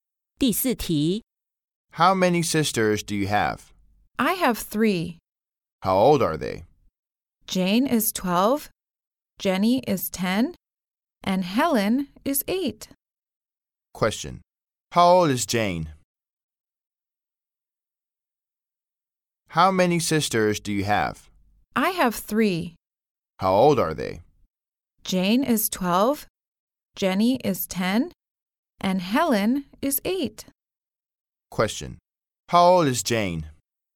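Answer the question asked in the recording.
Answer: 12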